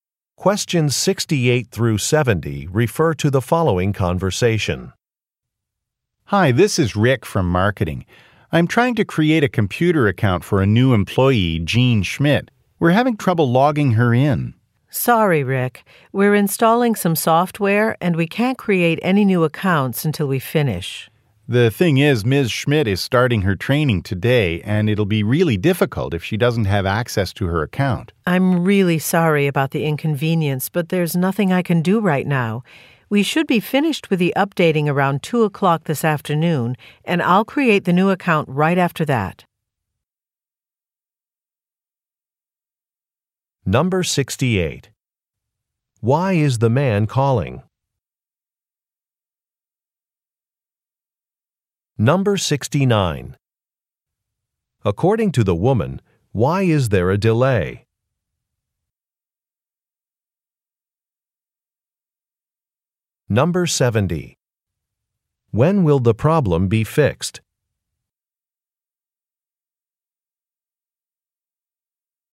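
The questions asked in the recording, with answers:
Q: Why is the man calling?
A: To create a computer account for a new employee

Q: According to the woman, why is there a delay?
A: Software is being installed

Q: When will the problem be fixed?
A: Around 2 o'clock this afternoon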